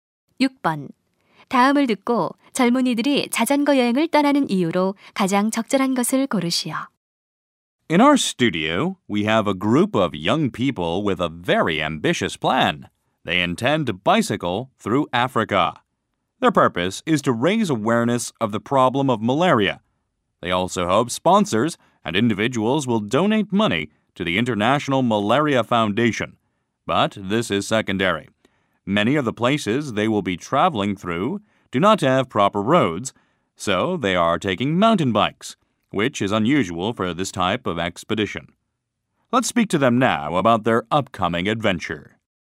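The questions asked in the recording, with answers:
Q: 다음을 듣고 젊은이들이 자전거 여행을 떠나는 이유로 가장 적절한 것을 고르시오.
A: 말라리아 문제에 대한 인식을 높이기 위해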